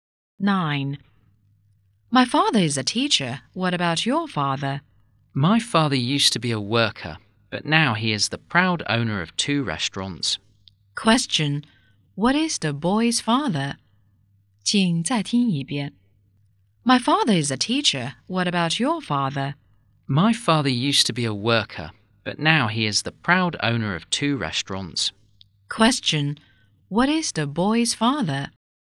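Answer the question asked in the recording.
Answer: A restaurant owner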